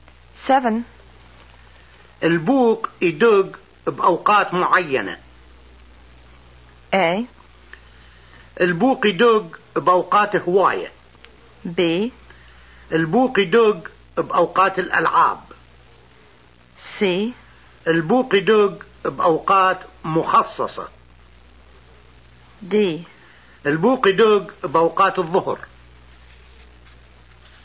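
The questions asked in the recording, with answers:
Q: البوق يدق بأوقات معينة.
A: C: البوق يدق بأوقات مخصصة.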